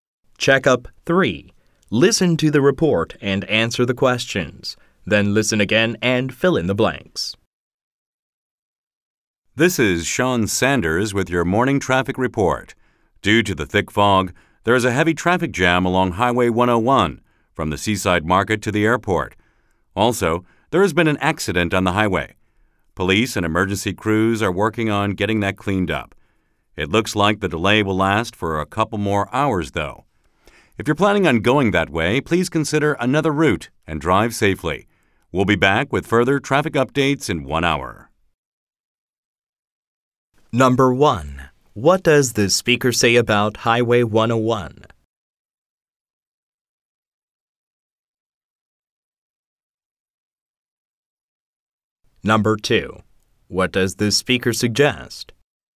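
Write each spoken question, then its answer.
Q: What does the speaker say about Highway 101?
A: There is a heavy traffic jam due to thick fog and an accident.

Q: What does the speaker suggest?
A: Take another route and drive safely.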